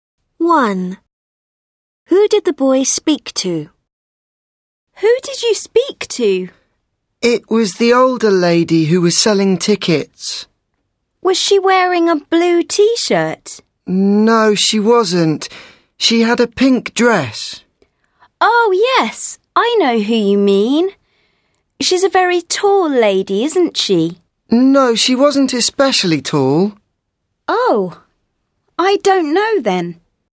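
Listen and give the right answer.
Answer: the older lady selling tickets, in a pink dress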